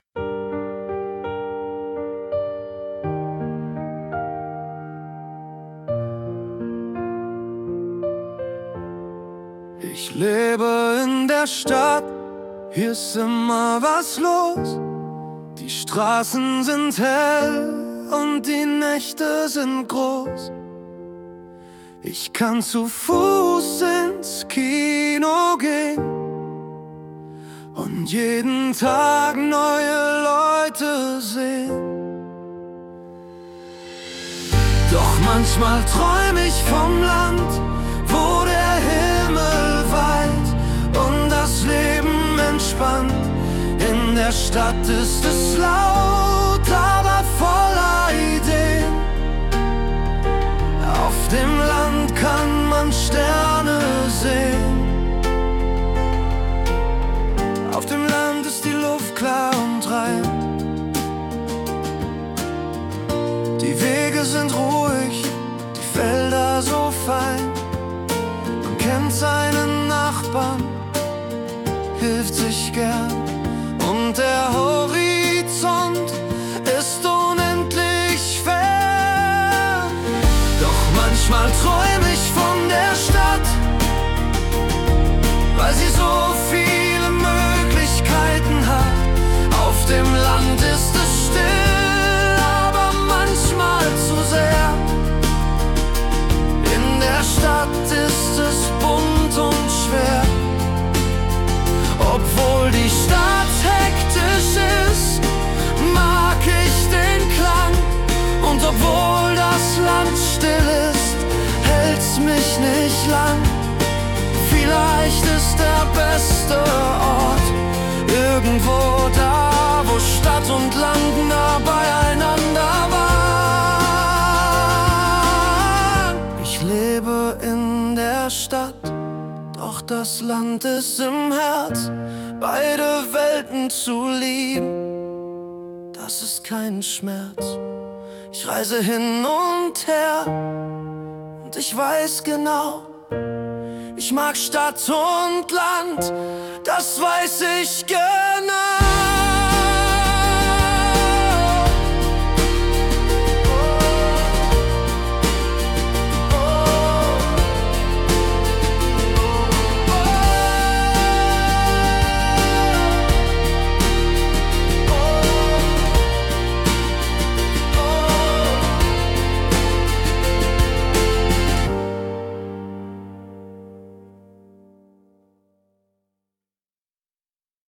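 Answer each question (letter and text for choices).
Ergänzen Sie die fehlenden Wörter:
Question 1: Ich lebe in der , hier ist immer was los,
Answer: Stadt

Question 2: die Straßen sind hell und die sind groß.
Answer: Nächte

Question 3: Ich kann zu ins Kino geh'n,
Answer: Fuß

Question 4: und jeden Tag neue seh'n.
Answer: Leute

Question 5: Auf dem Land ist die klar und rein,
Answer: Luft

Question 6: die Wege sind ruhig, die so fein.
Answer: Felder

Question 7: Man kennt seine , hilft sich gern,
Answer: Nachbarn

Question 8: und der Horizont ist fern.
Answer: unendlich

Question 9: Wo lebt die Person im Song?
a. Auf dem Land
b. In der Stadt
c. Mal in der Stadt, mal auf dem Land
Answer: b. In der Stadt

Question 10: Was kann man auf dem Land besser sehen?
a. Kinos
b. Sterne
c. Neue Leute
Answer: b. Sterne

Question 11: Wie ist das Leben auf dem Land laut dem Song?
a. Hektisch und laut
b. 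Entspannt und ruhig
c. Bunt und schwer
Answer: b. Entspannt und ruhig

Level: B1 Deutschkurs - Interaktives Lernmodul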